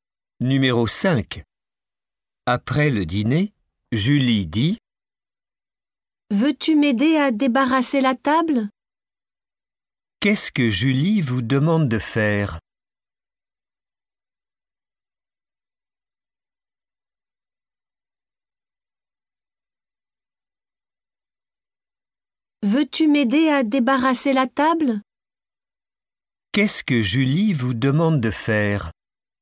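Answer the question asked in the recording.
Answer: L'aider à débarrasser la table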